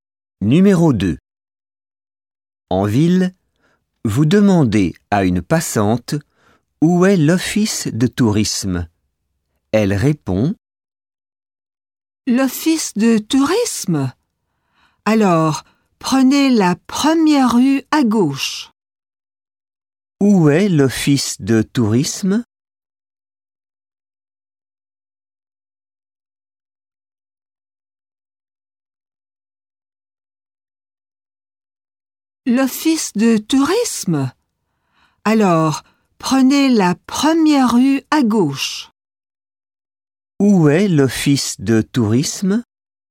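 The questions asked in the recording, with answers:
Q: Où est l'office de tourisme?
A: La première rue à gauche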